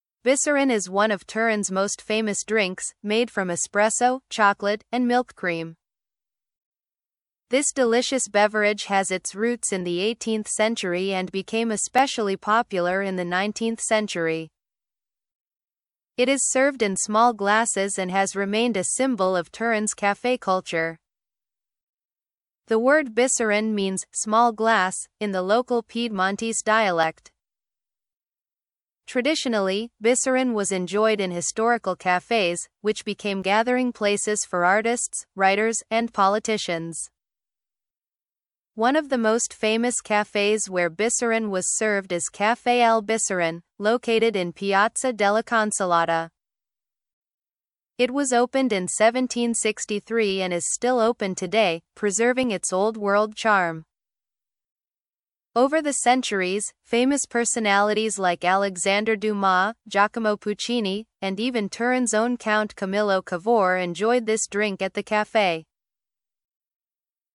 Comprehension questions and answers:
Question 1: What is Bicerin made of?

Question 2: What does the word Bicerin mean?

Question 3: Which famous café is associated with Bicerin?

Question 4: When was Caffè Al Bicerin opened?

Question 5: Name two famous people who enjoyed Bicerin at Caffè Al Bicerin.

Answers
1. Bicerin is made of espresso, chocolate, and milk cream.
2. The word Bicerin means «small glass» in the Piedmontese dialect.
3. Caffè Al Bicerin, located in Piazza della Consolata, is associated with Bicerin.
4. Caffè Al Bicerin was opened in 1763.
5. Alexandre Dumas and Giacomo Puccini were two famous people who enjoyed Bicerin.

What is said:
Bicerin is one of Turin's most famous drinks, made from espresso, chocolate, and milk cream. This delicious beverage has its roots in the 18th century and became especially popular in the 19th century. It is served in small glasses and has remained a symbol of Turin's café culture. The word bicerin means "small glass" in the local Piedmontese dialect. Traditionally, Bicerin was enjoyed in historical cafés, which became gathering places for artists, writers, and politicians.
One of the most famous cafés where Bicerin was served is Caffè Al Bicerin, located in Piazza della Consolata. It was opened in 1763 and is still open today, preserving its old-world charm. Over the centuries, famous personalities like Alexandre Dumas, Giacomo Puccini, and even Turin's own Count Camillo Cavour enjoyed this drink at the café.